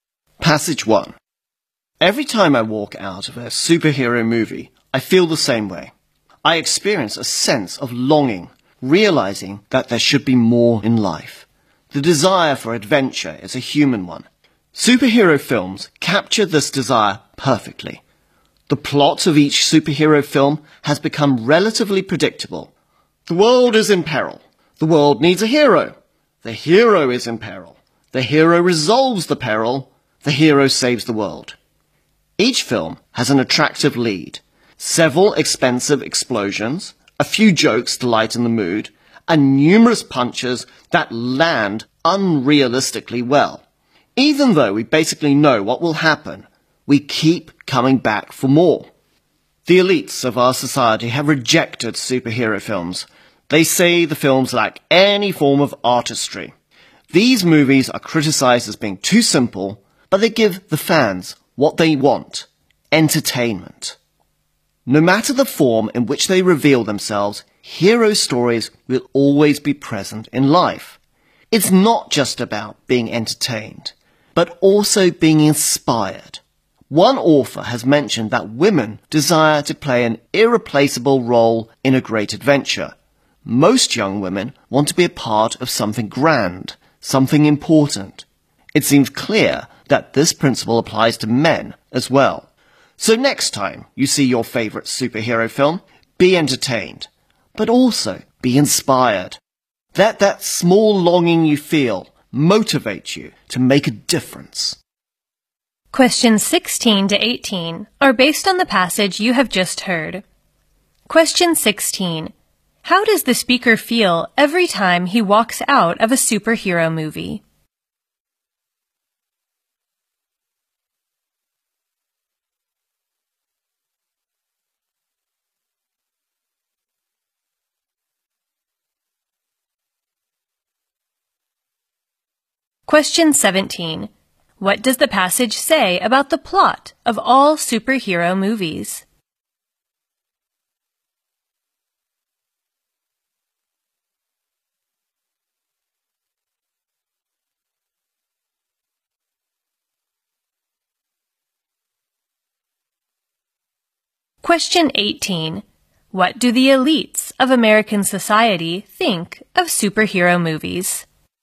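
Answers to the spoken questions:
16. He feels a longing for more in life.
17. It is fairly predictable.
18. They lack artistry.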